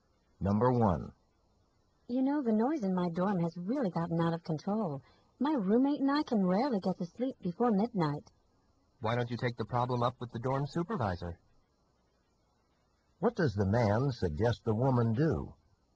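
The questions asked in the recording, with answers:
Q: What does the man suggest the woman do?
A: Talk to the dorm supervisor about the noise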